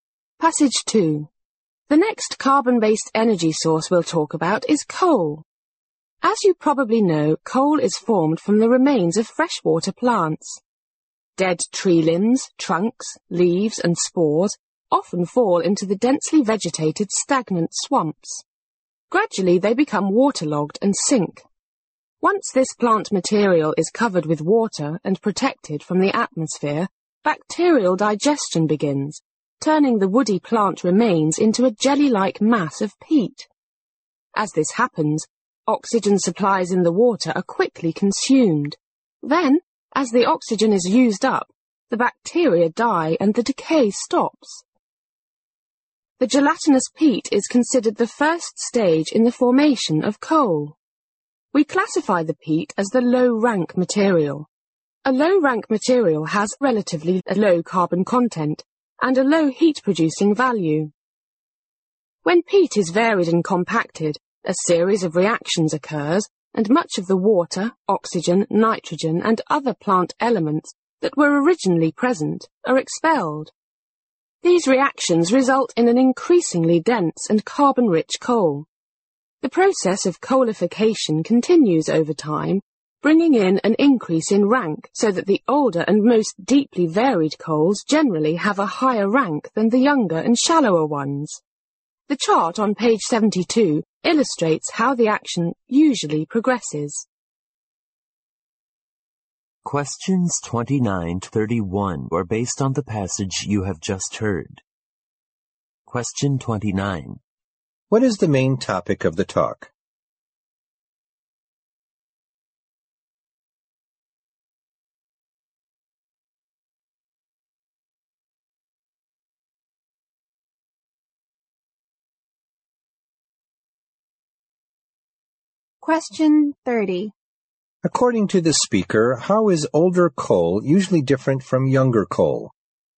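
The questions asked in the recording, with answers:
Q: What is the main topic of the talk?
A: How coal is formed

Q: According to the speaker, how is older coal usually different from younger coal?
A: It has a higher rank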